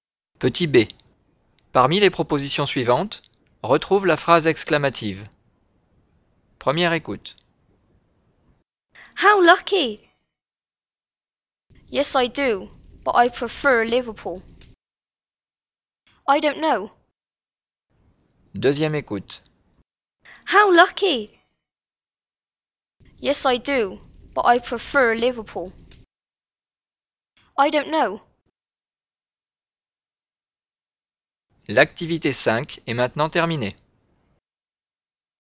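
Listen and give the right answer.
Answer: How lucky!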